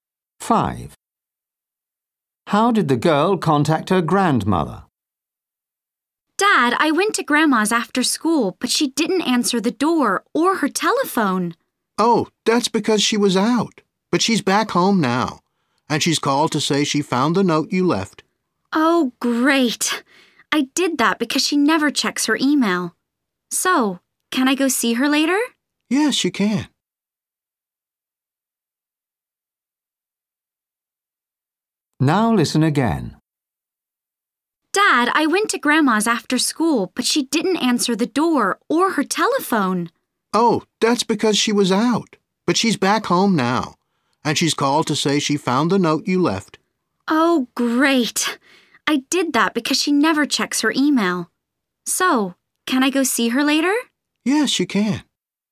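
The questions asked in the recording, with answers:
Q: How did the girl contact her grandmother?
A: she left a note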